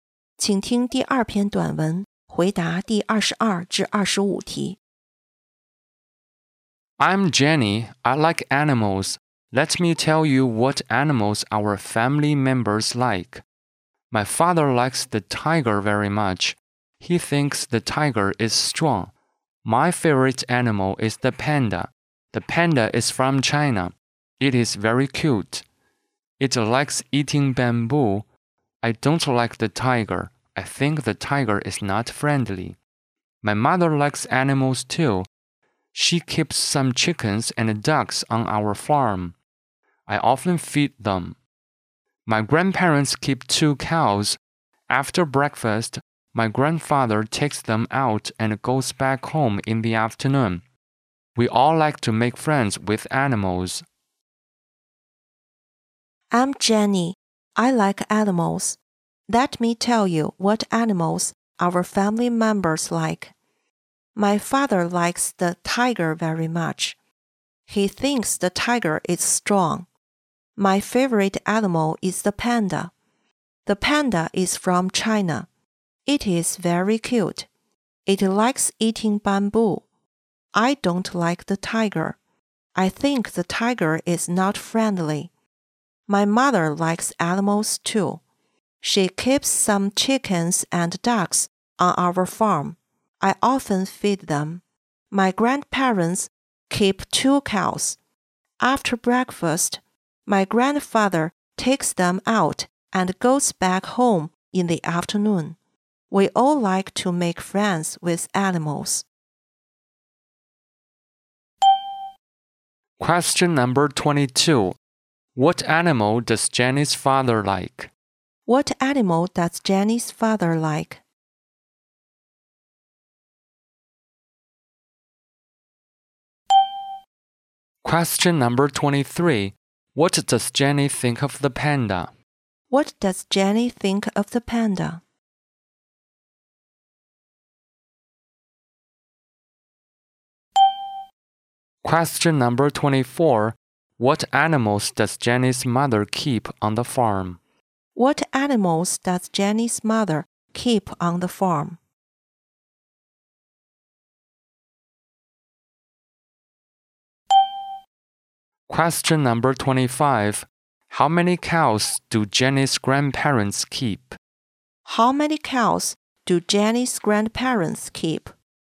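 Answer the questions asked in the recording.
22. The tiger.
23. It is very cute.
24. Chickens and ducks.
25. Two.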